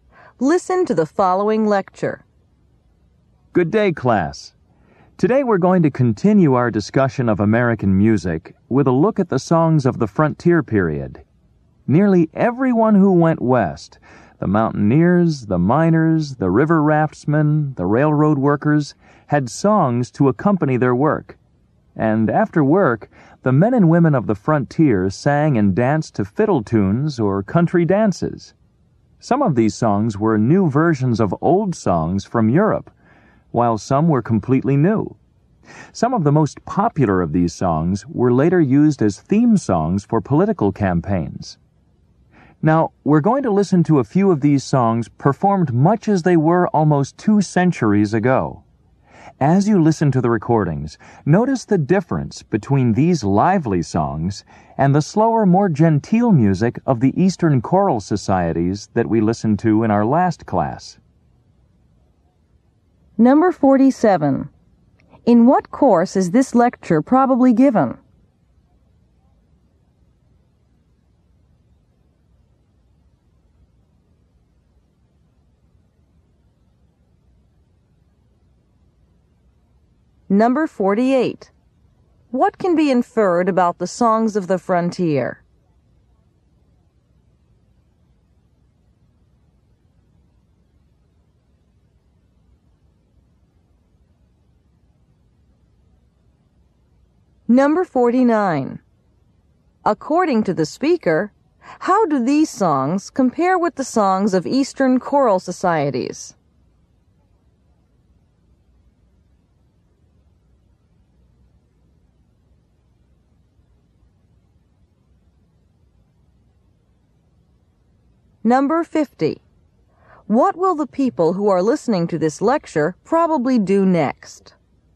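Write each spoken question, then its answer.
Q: In what course is this lecture probably given?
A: American music

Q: According to the speaker, how do these songs compare with the songs of Eastern choral societies?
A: They are livelier

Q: What will the people who are listening to this lecture probably do next?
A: Listen to recordings of frontier songs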